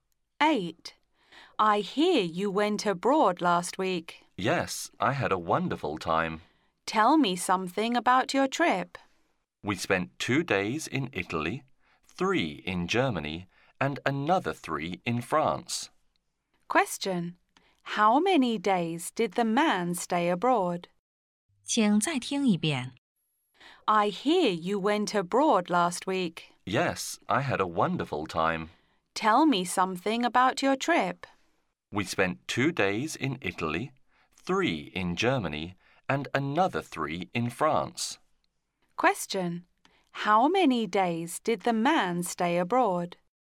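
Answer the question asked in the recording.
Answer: 8 days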